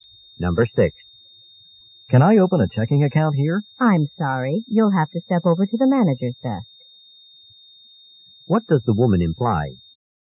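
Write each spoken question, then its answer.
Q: What does the woman imply?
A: The manager, not she, can open the account.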